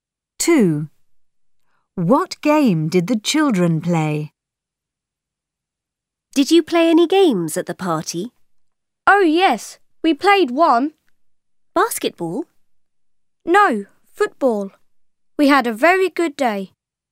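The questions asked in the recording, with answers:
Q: What game did the children play?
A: football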